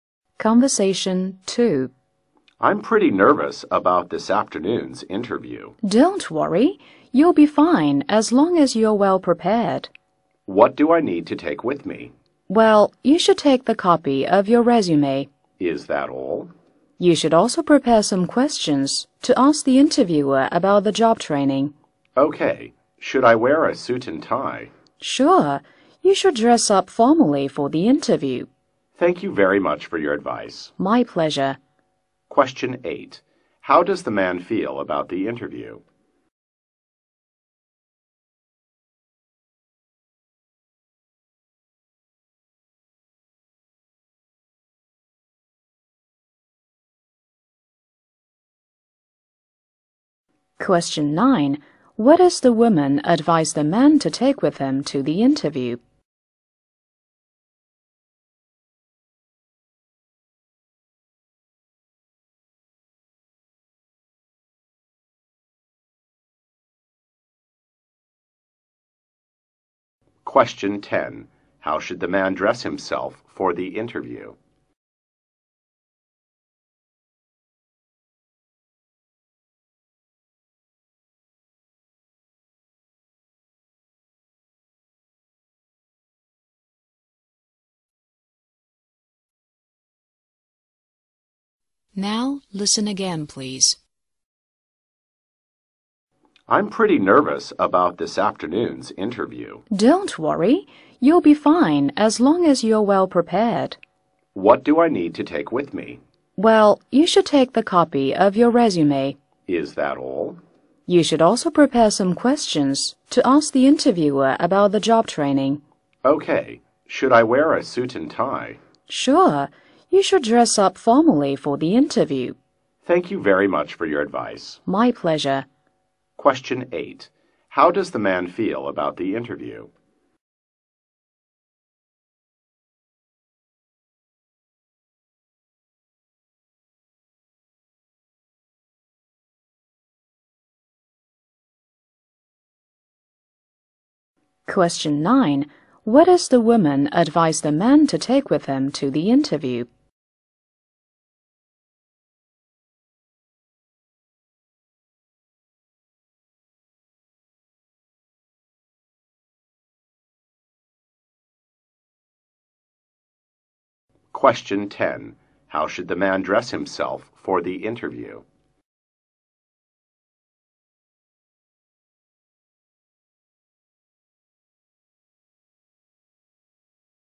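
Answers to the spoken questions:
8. Nervous
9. A copy of his resume
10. Formally, in a suit and tie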